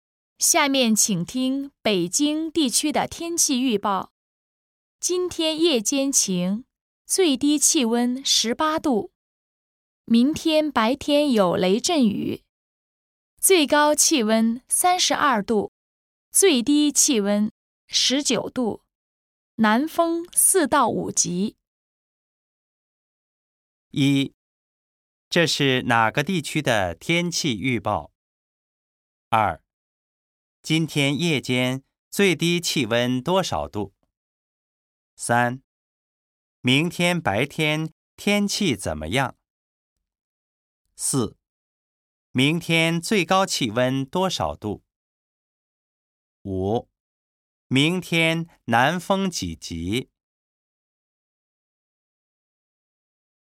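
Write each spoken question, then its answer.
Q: 这是哪个地区的天气预报?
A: 北京地区

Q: 今天夜间最低气温多少度?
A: 18度

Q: 明天白天天气怎么样?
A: 有雷阵雨

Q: 明天最高气温多少度?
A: 32度

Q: 明天南风几级?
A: 4到5级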